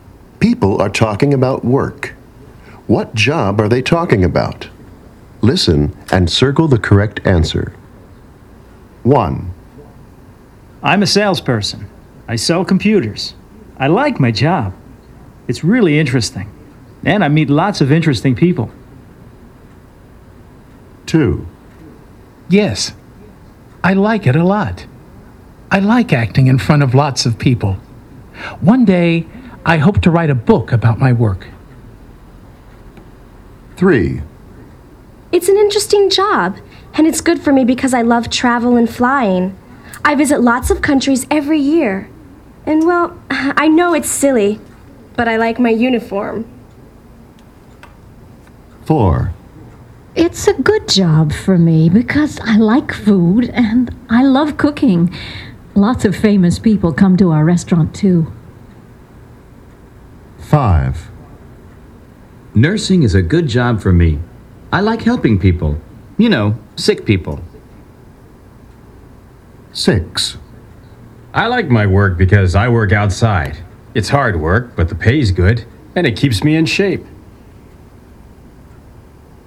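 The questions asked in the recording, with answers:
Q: What job are they talking about?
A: salesperson

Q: What job are they talking about?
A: actor

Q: What job are they talking about?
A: chef

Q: What job are they talking about?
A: nurse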